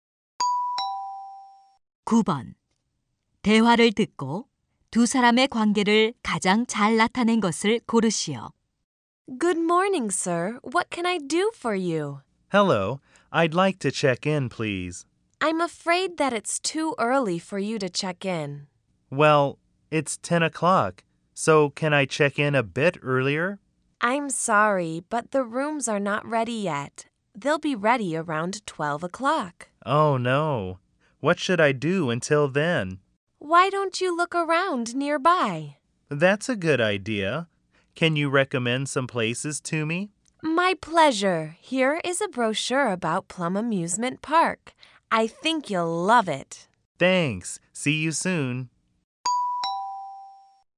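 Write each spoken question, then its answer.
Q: 대화를 듣고 두 사람의 관계를 가장 잘 나타낸 것을 고르시오.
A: 호텔 직원 - 투숙객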